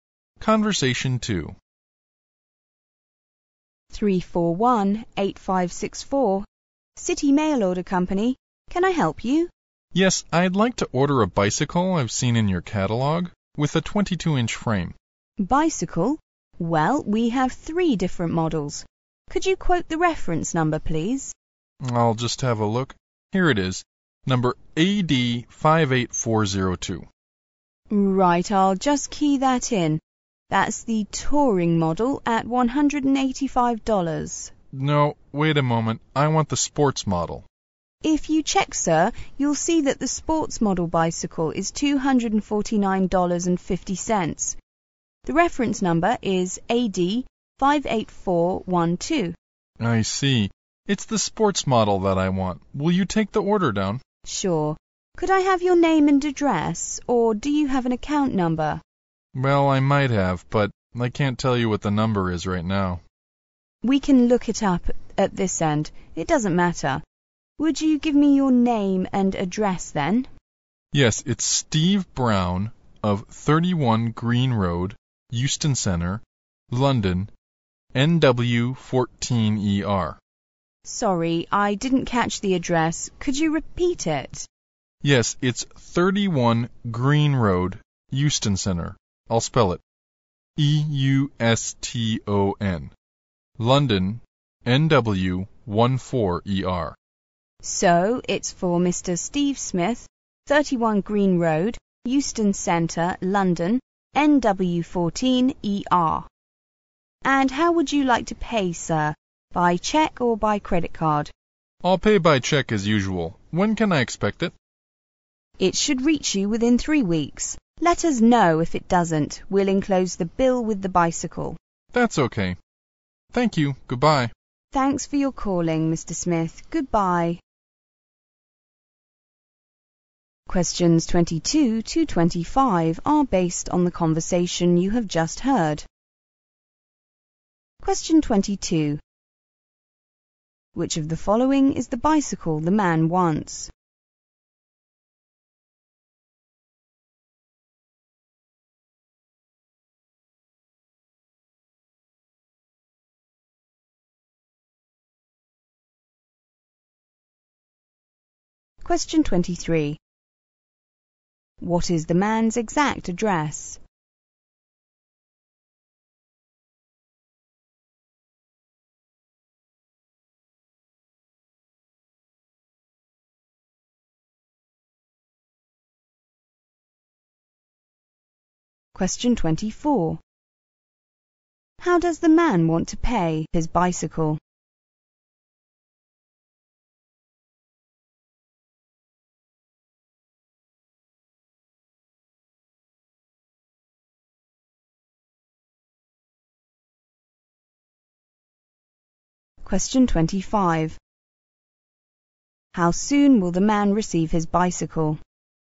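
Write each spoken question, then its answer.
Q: Which of the following is the bicycle the man wants?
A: The sports model, AD58412, $249.50

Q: What is the man's exact address?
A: 31 Green Road, Euston Centre, London, NW14ER

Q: How does the man want to pay his bicycle?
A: By cheque

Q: How soon will the man receive his bicycle?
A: Within 3 weeks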